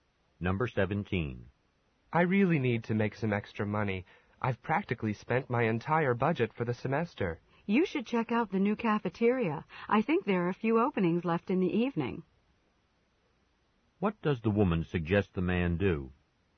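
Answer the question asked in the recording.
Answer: Look for a job at the new cafeteria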